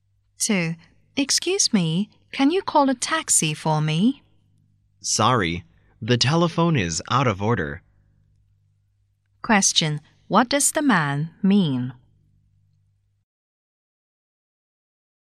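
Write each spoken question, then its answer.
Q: What does the man mean?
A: He can't call a taxi because the telephone is out of order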